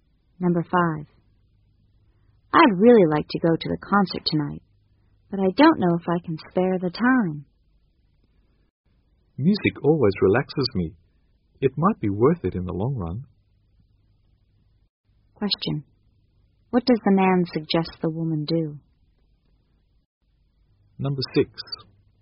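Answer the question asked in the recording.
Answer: Go to the concert to relax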